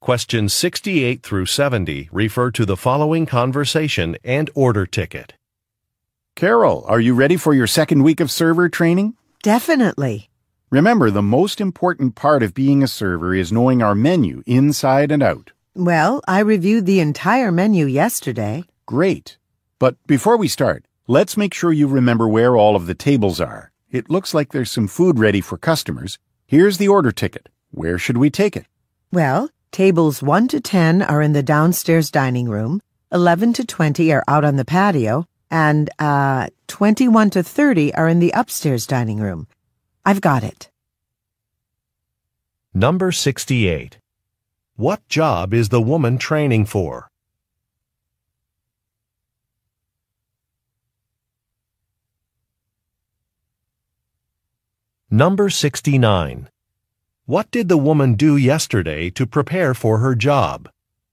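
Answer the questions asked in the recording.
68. Server
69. She reviewed the entire menu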